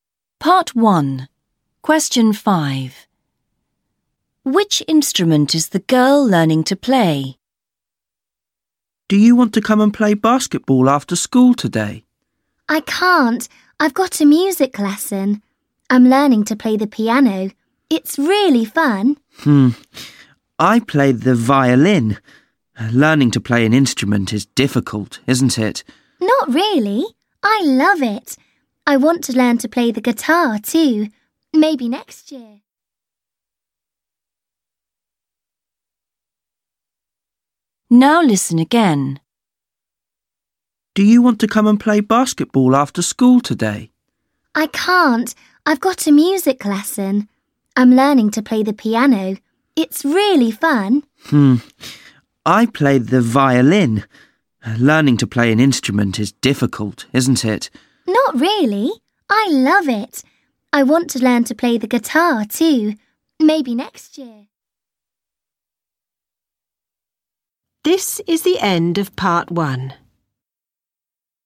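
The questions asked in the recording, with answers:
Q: Which instrument is the girl learning to play?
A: the piano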